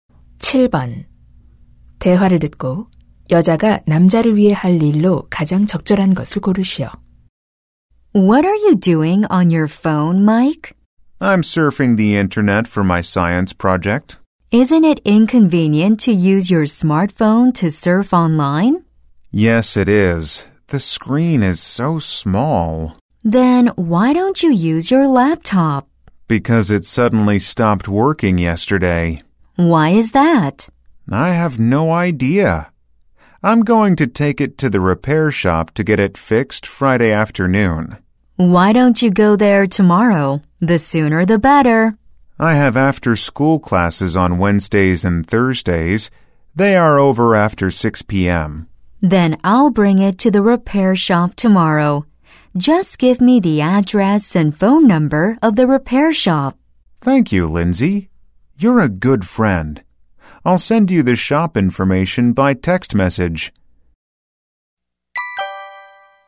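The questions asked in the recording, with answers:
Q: 대화를 듣고 여자가 남자를 위해 할 일로 가장 적절한 것을 고르시오.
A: 노트북을 수리점에 가져다주기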